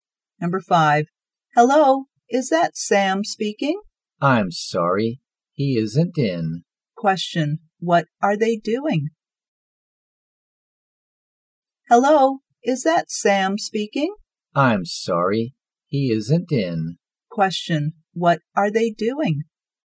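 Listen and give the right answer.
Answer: Making a phone call.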